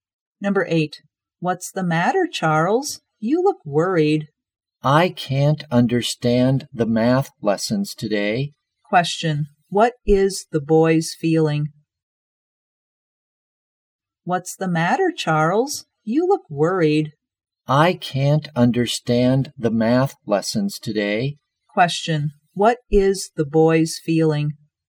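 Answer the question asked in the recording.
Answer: Worried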